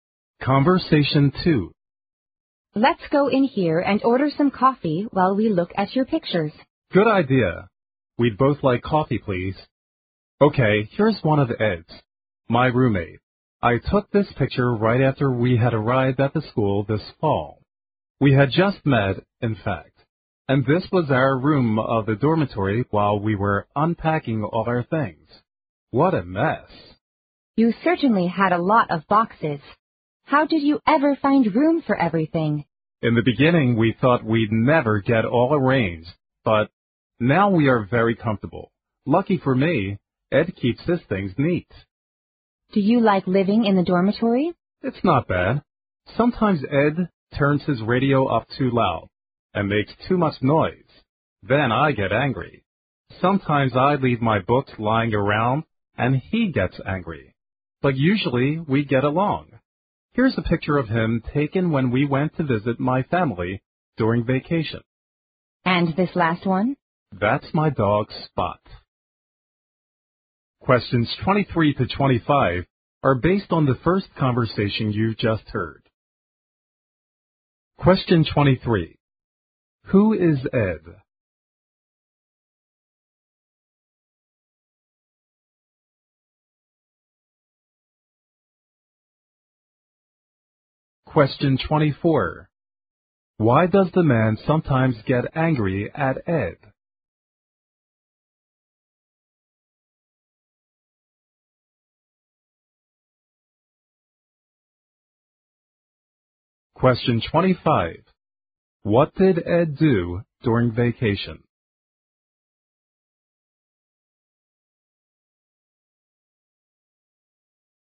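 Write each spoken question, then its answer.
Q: Who is Ed?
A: The man's roommate

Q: Why does the man sometimes get angry at Ed?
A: Ed turns his radio up too loud

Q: What did Ed do during vacation?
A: He visited the man's family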